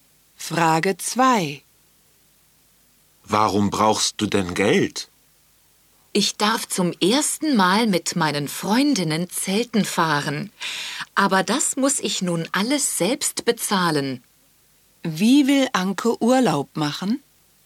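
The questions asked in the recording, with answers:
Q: Wie will Anke Urlaub machen?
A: Zelten mit ihren Freundinnen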